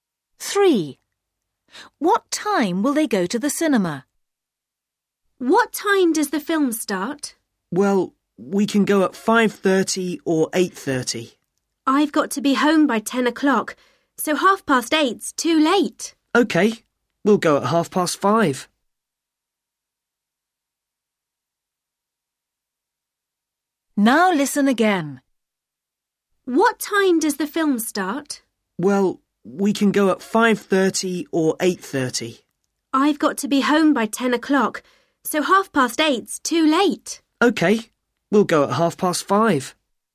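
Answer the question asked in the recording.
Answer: 5:30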